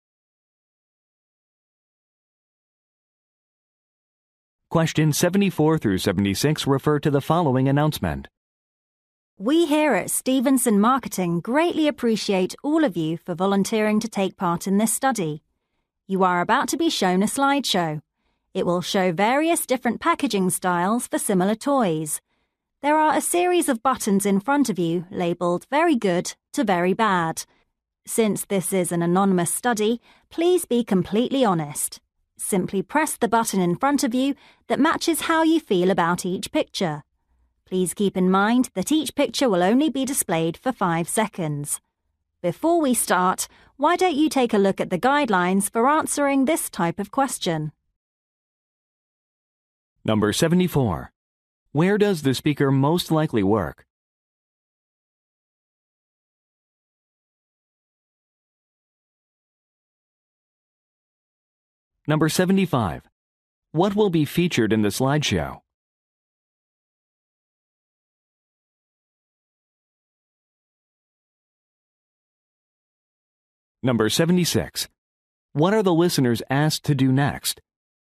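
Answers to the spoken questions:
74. At a marketing firm (Stevenson Marketing)
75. Packaging styles for similar toys
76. Look at the guidelines for answering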